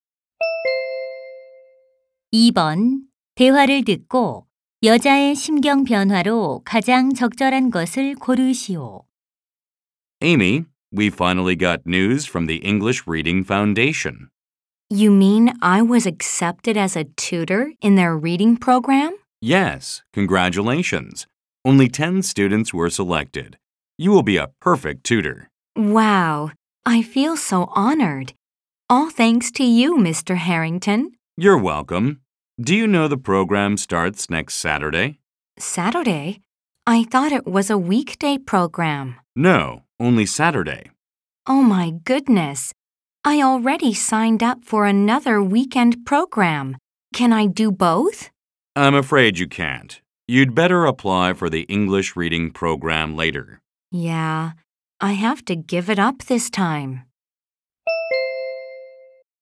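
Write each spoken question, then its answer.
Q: 대화를 듣고 여자의 심경 변화로 가장 적절한 것을 고르시오.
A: 기쁨에서 실망으로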